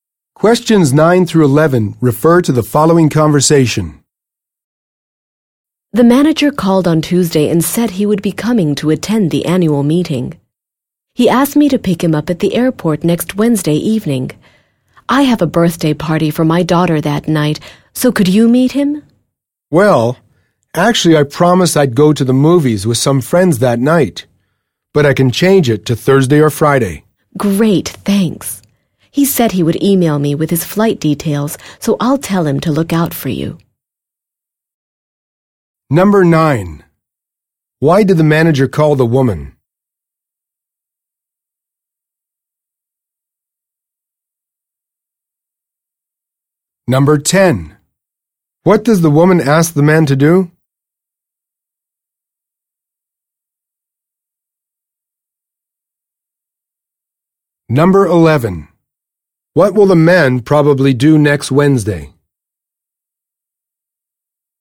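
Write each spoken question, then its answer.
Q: Why did the manager call the woman?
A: To say he was coming to the annual meeting and ask to be picked up at the airport

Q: What does the woman ask the man to do?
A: Meet the manager at the airport

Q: What will the man probably do next Wednesday?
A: Pick up the manager at the airport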